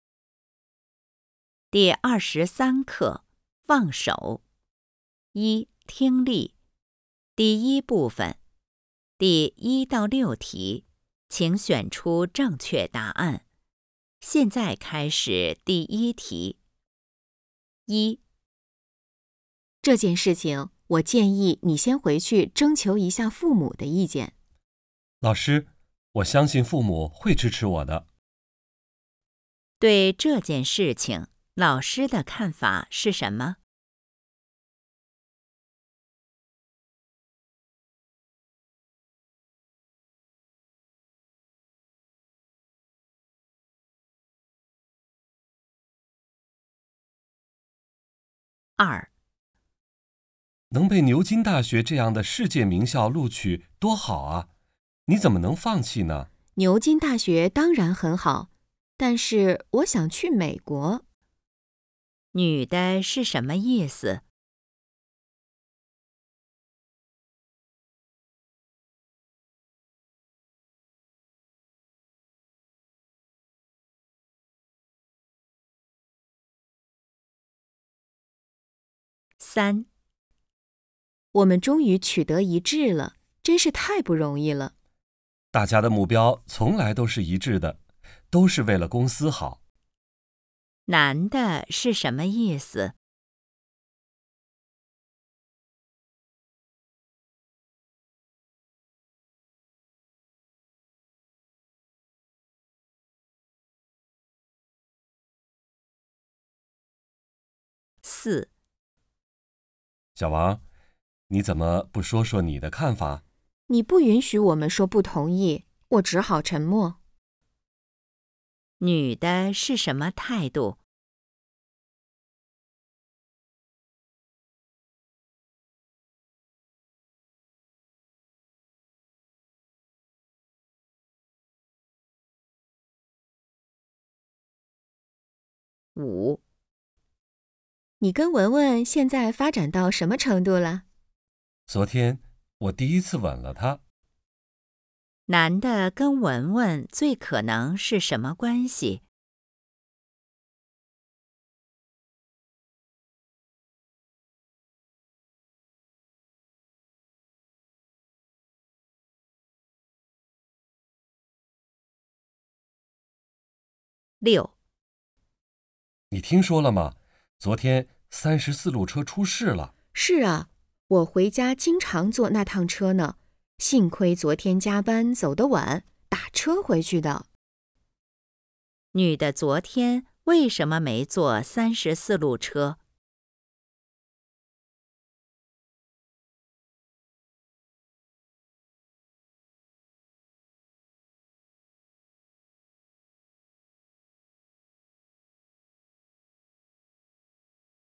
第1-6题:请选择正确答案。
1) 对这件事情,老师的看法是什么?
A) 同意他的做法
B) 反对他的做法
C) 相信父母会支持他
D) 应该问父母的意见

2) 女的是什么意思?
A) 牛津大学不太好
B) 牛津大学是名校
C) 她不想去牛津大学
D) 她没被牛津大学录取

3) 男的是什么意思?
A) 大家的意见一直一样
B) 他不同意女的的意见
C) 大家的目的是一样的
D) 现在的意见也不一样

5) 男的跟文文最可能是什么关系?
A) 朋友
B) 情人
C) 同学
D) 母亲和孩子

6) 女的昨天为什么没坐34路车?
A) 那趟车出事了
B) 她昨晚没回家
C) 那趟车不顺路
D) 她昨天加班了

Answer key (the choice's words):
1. 应该问父母的意见
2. 她不想去牛津大学
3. 大家的目的是一样的
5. 情人
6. 她昨天加班了

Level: HSK 5